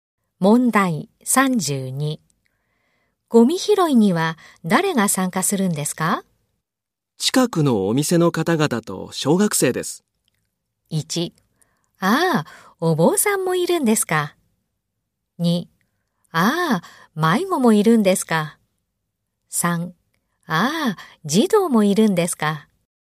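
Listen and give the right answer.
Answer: 3: ああ、児童もいるんですか。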